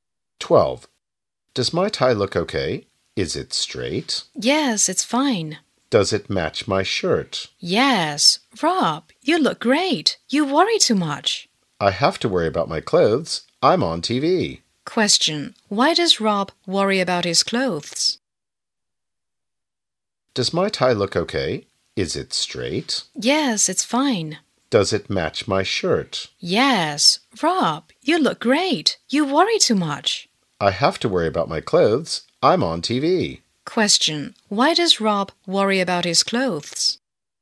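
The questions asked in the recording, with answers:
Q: Why does Rob worry about his clothes?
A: Because he is going to be on TV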